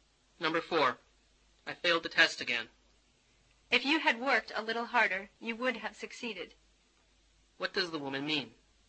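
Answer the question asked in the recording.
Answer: He didn't work hard enough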